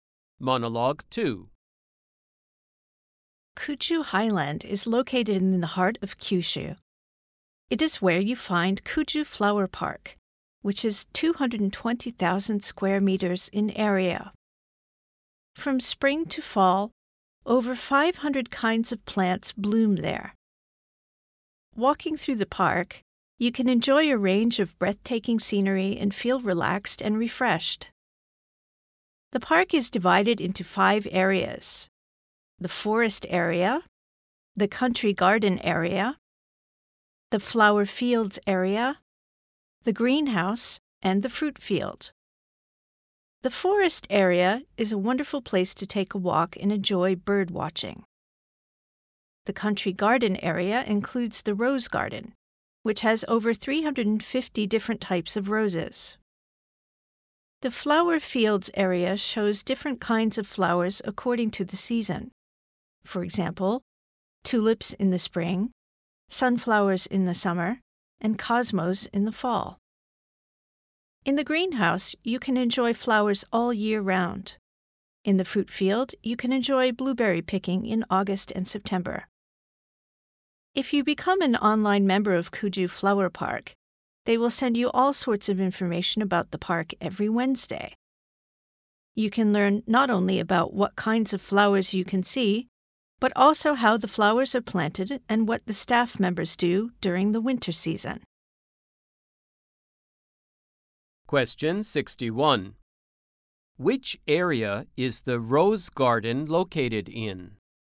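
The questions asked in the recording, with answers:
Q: Which area is the rose garden located in?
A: The country garden area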